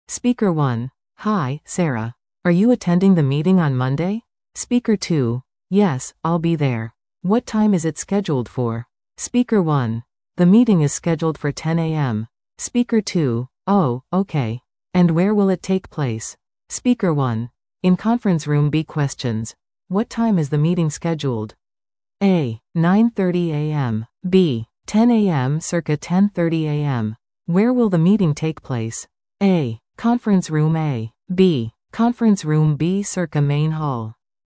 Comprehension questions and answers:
Where will the meeting take place?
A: Conference Room B

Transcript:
Speaker 1: Hi, Sarah. Are you attending the meeting on Monday?
Speaker 2: Yes, I'll be there. What time is it scheduled for?
Speaker 1: The meeting is scheduled for 10:00 AM.
Speaker 2: Oh, okay. And where will it take place?
Speaker 1: In Conference Room B.
Questions:
1. What time is the meeting scheduled?